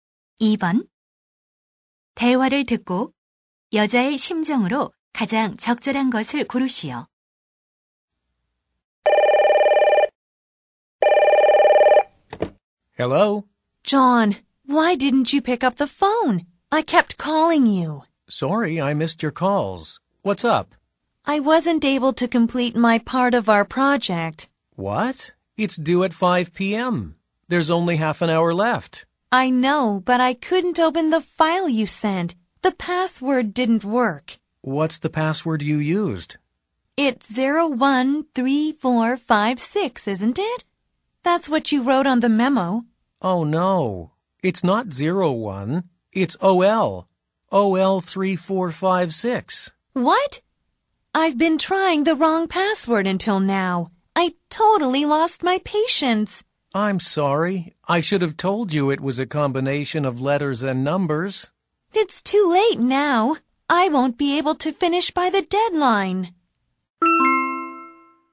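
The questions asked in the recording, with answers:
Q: 대화를 듣고 여자의 심정으로 가장 적절한 것을 고르시오.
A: 답답하고 짜증남 (frustrated)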